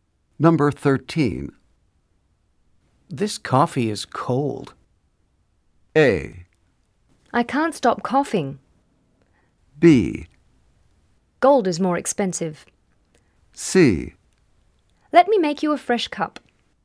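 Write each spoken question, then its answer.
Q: This coffee is cold.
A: C: Let me make you a fresh cup.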